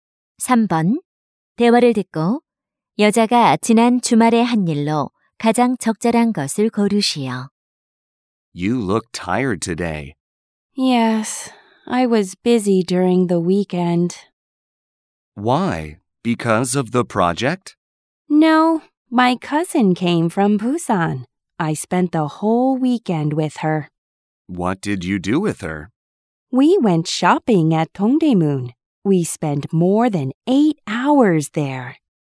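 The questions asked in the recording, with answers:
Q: 대화를 듣고 여자가 지난 주말에 한 일로 가장 적절한 것을 고르시오.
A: 사촌과 동대문에서 쇼핑하기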